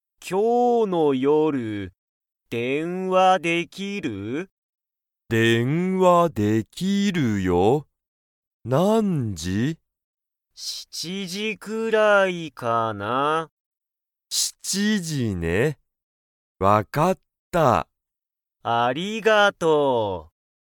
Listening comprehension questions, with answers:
Comprehension Quiz (Skip if you don't understand the conversation yet)(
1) じゅんとたかしは、今日(きょう)の夜電話(よるでんわ)しますか?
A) はい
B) いいえ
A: A) はい

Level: Level 1

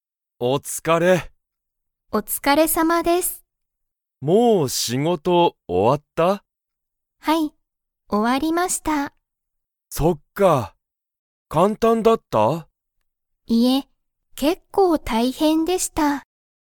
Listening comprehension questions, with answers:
山田やまださんの仕事しごとは簡単かんたんでしたか?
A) はい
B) いいえ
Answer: B) いいえ

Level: Level 1

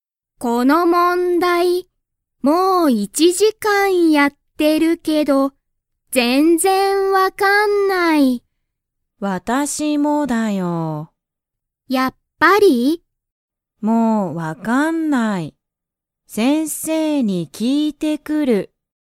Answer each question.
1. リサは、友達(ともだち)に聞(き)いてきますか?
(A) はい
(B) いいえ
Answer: (B) いいえ

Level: Level 1

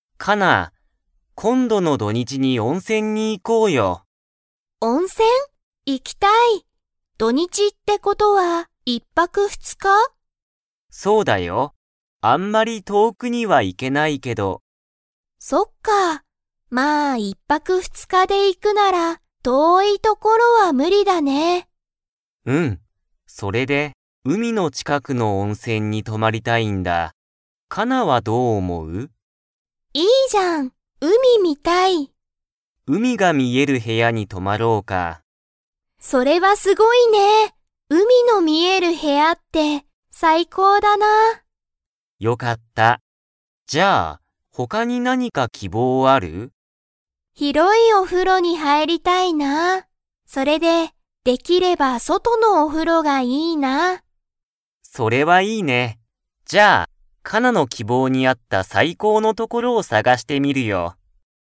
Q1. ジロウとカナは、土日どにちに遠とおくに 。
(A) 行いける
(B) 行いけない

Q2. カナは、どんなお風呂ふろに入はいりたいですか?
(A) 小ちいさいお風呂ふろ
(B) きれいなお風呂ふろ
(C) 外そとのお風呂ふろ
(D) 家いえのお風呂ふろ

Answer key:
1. (B) 行いけない
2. (C) 外そとのお風呂ふろ

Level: Level 4

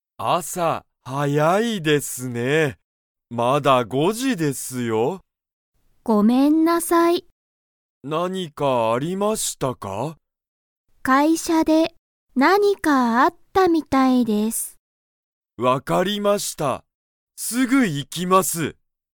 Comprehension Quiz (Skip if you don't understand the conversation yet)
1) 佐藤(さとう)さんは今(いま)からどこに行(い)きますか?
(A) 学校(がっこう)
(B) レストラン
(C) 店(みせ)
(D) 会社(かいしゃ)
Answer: (D) 会社(かいしゃ)

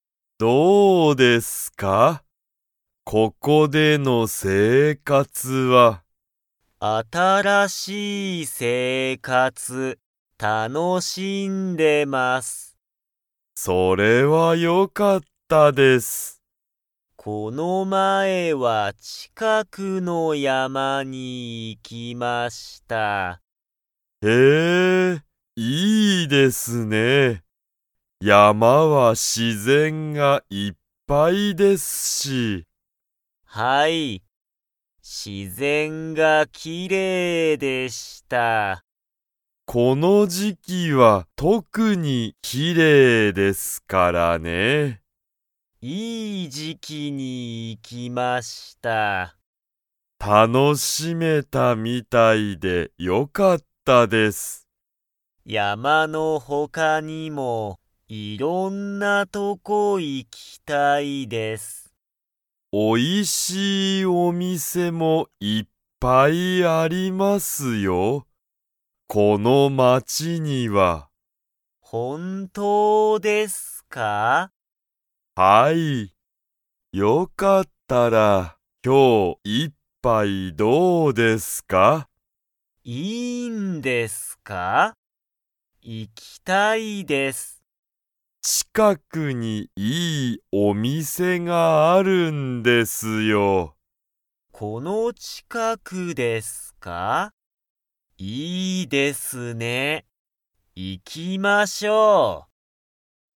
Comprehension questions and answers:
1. 鈴木(すずき)さんは、____近(ちか)くの山(やま)に行(い)った。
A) いつも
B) 昨日(きのう)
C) この前(まえ)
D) よく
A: C) この前(まえ)

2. この街(まち)には、おいしいお店(みせ)がいっぱいありますか?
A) はい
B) いいえ)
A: A) はい

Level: Level 2

